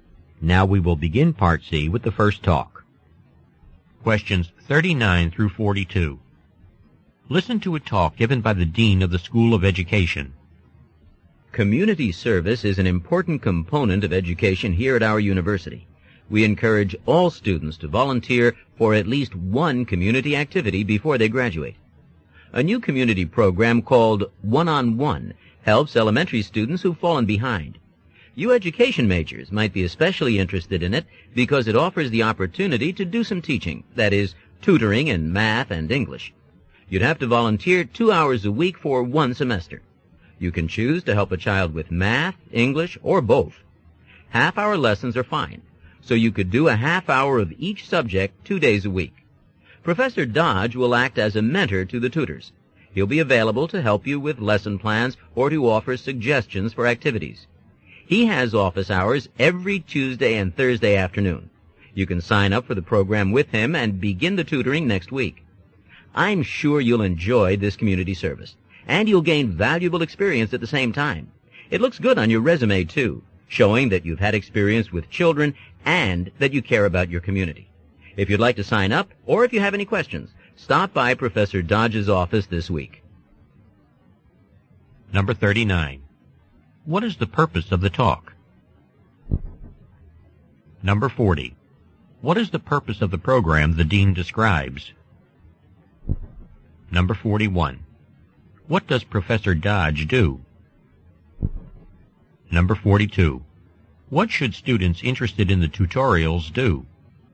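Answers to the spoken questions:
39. To encourage students to volunteer for a tutoring program
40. To help elementary students who have fallen behind
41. He acts as a mentor to the tutors
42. Go to Professor Dodge's office this week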